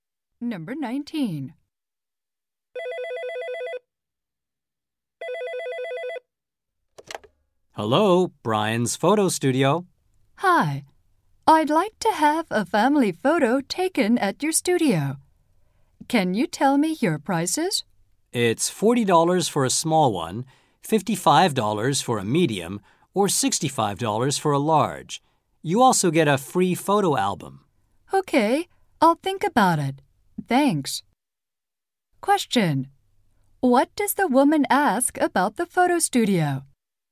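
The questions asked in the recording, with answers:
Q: Question. What does the woman ask about the photo studio?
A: Its prices.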